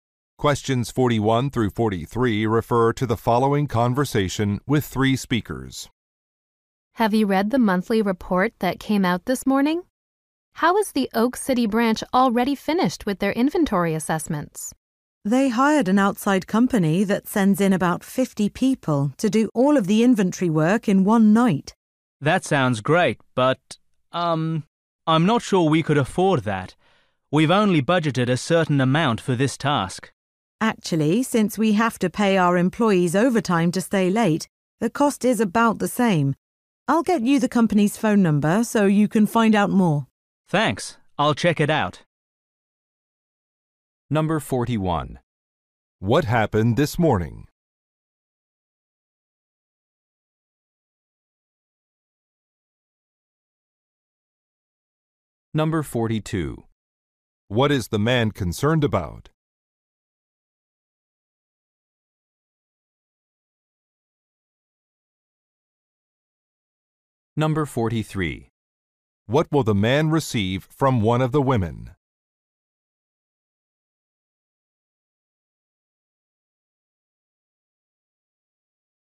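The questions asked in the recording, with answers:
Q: What happened this morning?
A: The monthly report came out

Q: What is the man concerned about?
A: The cost / the budget

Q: What will the man receive from one of the women?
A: The company's phone number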